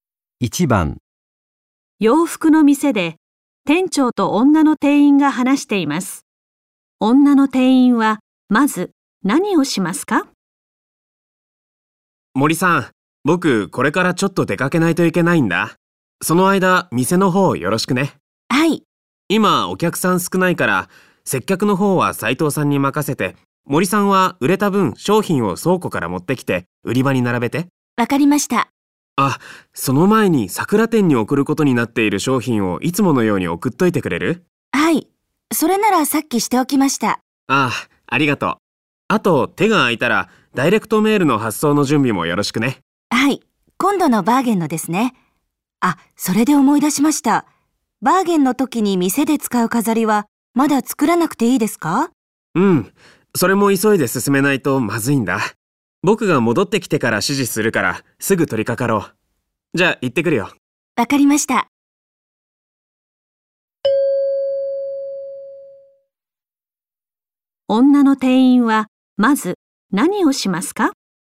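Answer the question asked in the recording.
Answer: 売れた分の商品を倉庫から持ってきて売り場に並べる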